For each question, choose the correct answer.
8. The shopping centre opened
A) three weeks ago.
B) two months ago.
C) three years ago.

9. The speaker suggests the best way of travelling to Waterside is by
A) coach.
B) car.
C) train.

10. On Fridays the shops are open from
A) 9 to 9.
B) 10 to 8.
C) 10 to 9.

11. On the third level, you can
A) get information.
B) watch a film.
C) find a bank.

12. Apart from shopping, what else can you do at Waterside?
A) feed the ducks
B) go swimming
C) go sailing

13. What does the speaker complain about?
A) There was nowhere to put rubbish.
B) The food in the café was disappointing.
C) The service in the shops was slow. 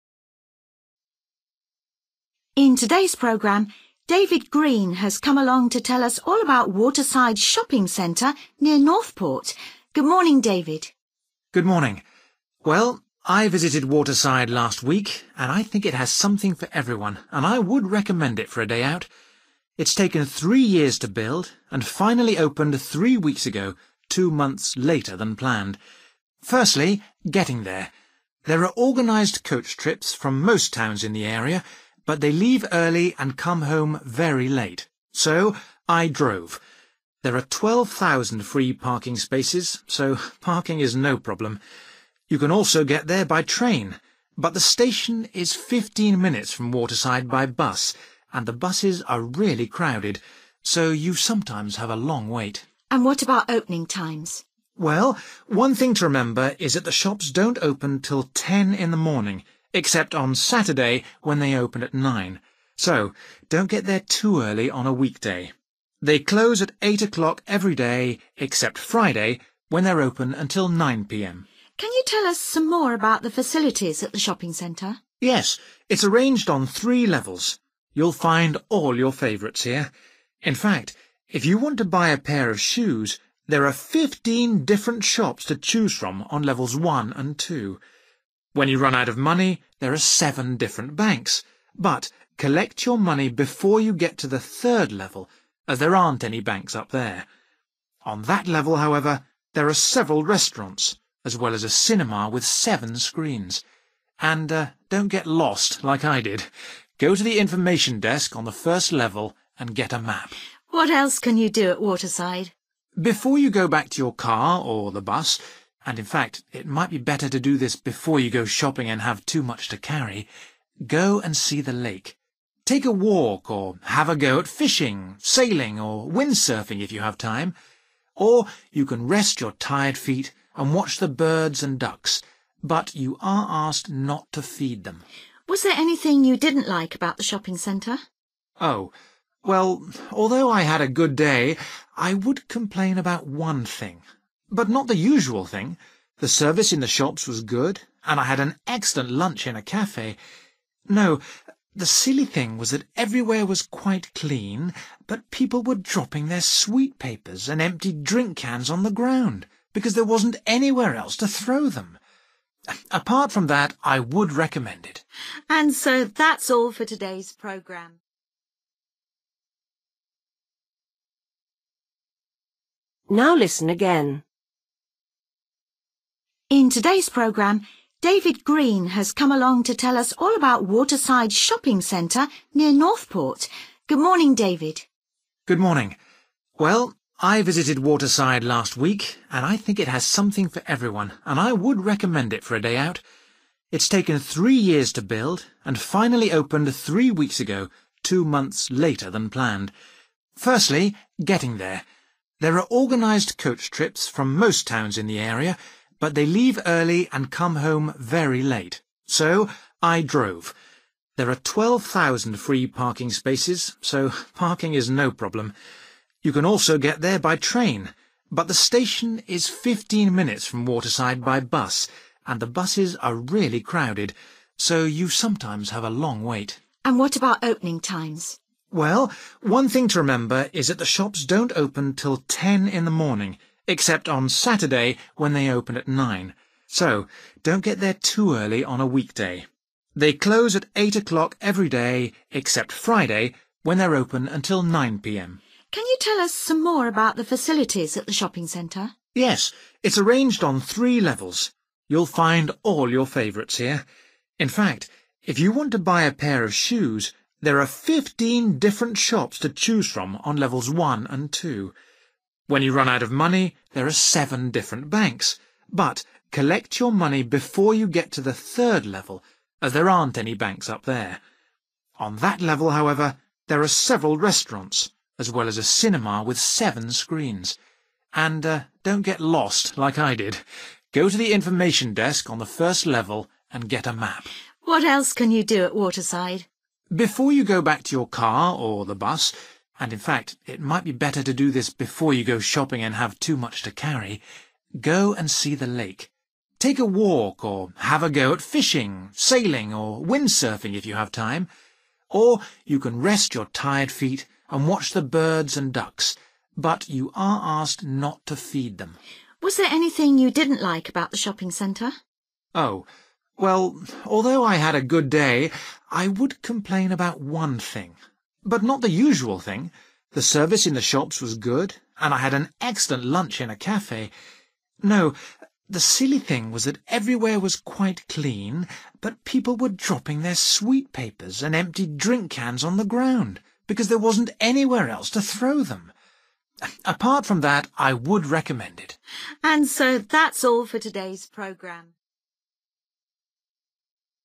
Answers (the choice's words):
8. three weeks ago.
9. car.
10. 10 to 9.
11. watch a film.
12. go sailing
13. There was nowhere to put rubbish.

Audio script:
Presenter: In today's programme, David Green has come along to tell us all about Waterside Shopping Centre near Northport. Good morning, David.
David: Good morning. Well, I visited Waterside last week and I think it has something for everyone and I would recommend it for a day out. It's taken three years to build and finally opened three weeks ago, two months later than planned.
Firstly, getting there; there are organised coach trips from most towns in the area but they leave early and come home very late, so I drove. There are 12,000 free parking spaces, so parking is no problem. You can also get there by train, but the station is 15 minutes from Waterside by bus, and the buses are really crowded so you sometimes have a long wait.
Presenter: And what about opening times?
David: Well, one thing to remember is that the shops don't open till 10.00 in the morning except on Saturday when they open at 9.00. So don't get there too early on a weekday. They close at 8 o'clock every day except Friday when they're open until 9 pm.
Presenter: Can you tell us some more about the facilities at the shopping centre?
David: Yes, it's arranged on three levels. You'll find all your favourites here. In fact if you want to buy a pair of shoes there are 15 different shops to choose from on levels one and two. When you run out of money there are seven different banks, but collect your money before you get to the third level as there aren't any banks up there. On that level, however, there are several restaurants as well as a cinema with seven screens. And don't get lost like I did, go to the information desk on the first level and get a map.
Presenter: What else can you do at Waterside?
David: Before you go back to your car or the bus – and in fact it might be better to do this before you go shopping and have too much to carry – go and see the late. Take a walk or have a go at fishing, sailing or wind surfing if you have time. Or you can rest your tired feet and watch the birds and ducks, but you are asked not to feed them.
Presenter: Was there anything you didn't like about the shopping centre?
David: Oh. Well, although I had a good day I would complain about one thing, but not the usual thing – the service in the shops was good and I had an excellent lunch in a café. No, the silly thing was that everywhere was quite clean but people were dropping their sweet papers and empty drink cans on the ground because there wasn't anywhere else to throw them. Apart from that I would recommend it.
Presenter: And so that's all for today's programme ...

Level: B1